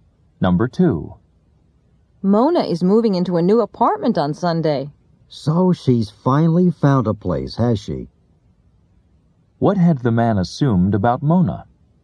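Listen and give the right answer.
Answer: That she hadn't found a place yet.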